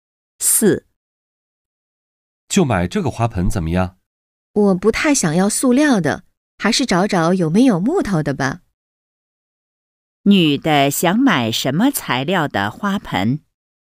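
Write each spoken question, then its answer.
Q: 女的想买什么材料的花盆?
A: 木头的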